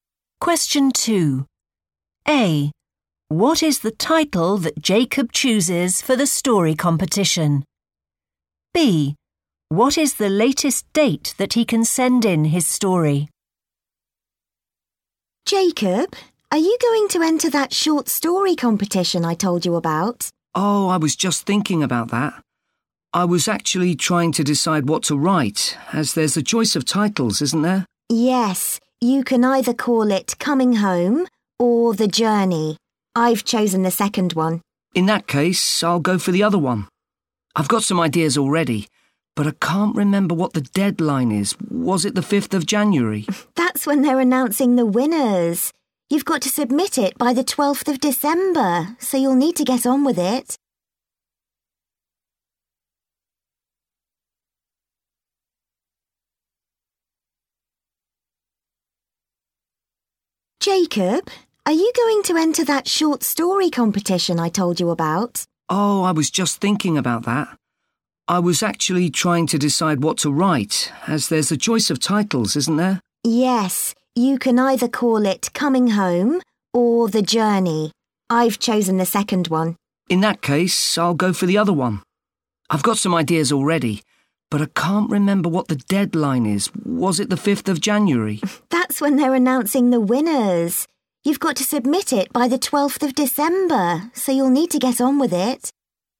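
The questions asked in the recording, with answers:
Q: What is the title that Jacob chooses for the story competition?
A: Coming Home

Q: What is the latest date that he can send in his story?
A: 12th December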